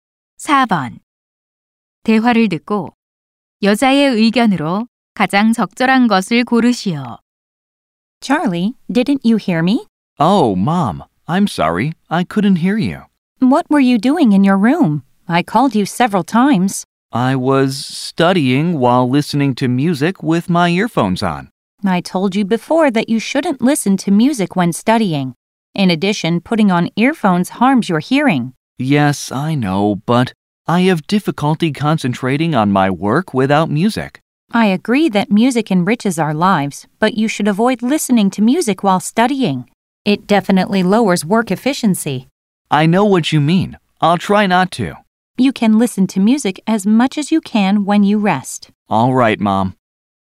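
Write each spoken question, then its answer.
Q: 대화를 듣고 여자의 의견으로 가장 적절한 것을 고르시오.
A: 공부할 때 음악을 듣지 말아야 한다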